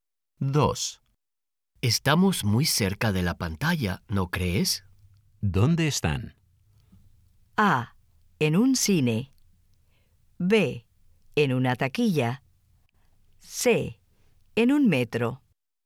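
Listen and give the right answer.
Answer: A: En un cine.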